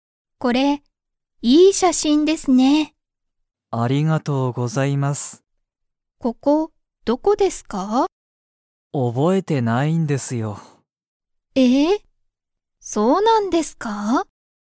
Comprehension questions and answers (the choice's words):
それは、いい写真しゃしんですか?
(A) はい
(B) いいえ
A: はい

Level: Level 1